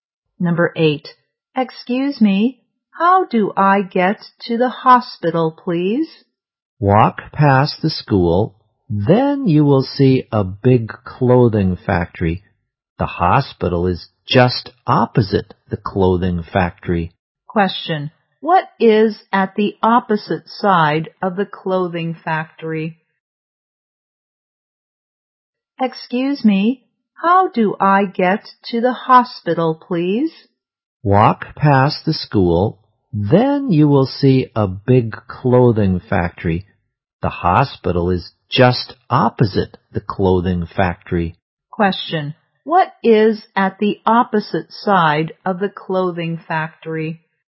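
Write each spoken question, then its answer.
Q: Question. What is at the opposite side of the clothing factory?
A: The hospital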